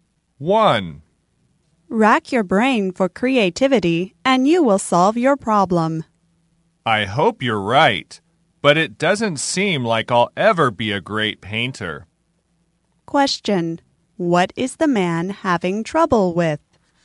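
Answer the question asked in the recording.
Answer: Becoming a great painter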